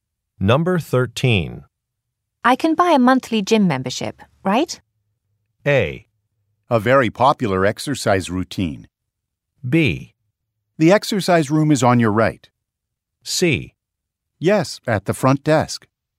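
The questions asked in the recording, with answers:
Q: I can buy a monthly gym membership, right?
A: C: Yes, at the front desk.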